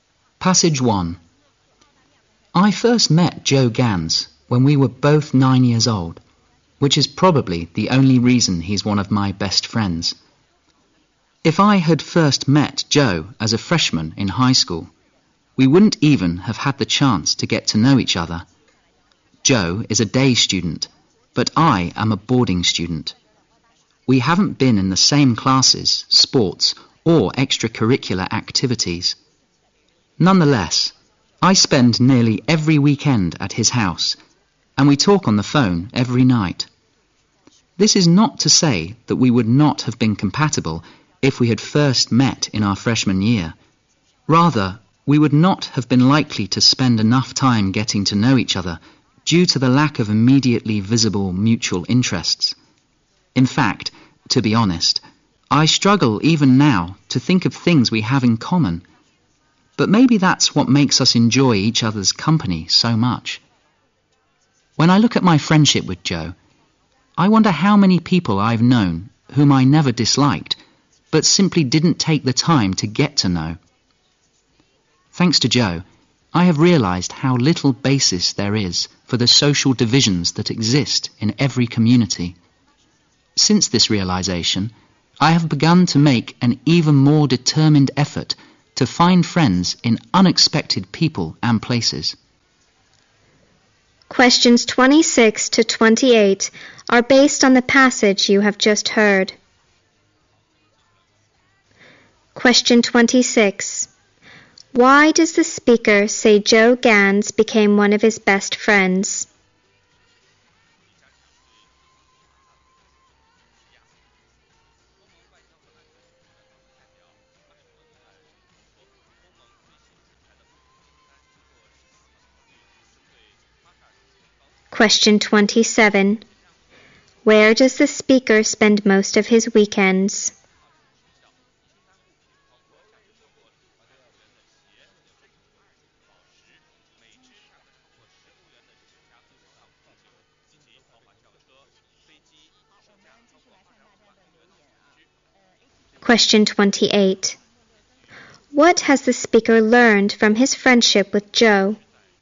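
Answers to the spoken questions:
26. They met when they were 9 years old
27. At Joe's house
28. There is little basis for social divisions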